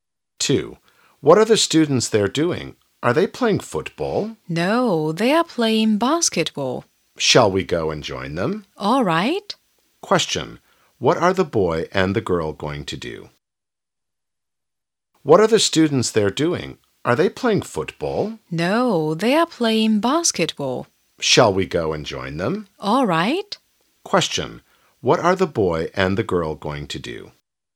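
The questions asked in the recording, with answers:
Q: What are the boy and the girl going to do?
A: Join the students playing basketball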